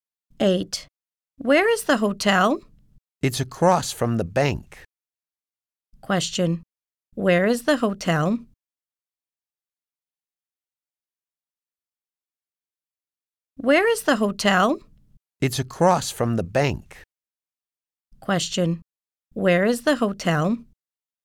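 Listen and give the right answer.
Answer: Across from the bank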